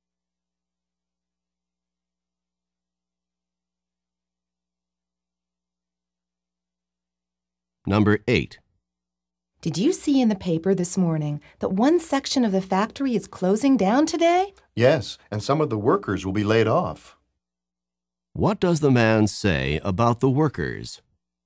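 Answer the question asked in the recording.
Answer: Some will lose their jobs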